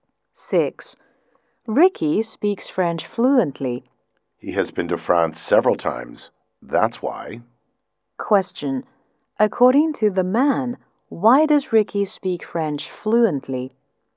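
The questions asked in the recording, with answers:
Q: According to the man, why does Ricky speak French fluently?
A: He has been to France several times.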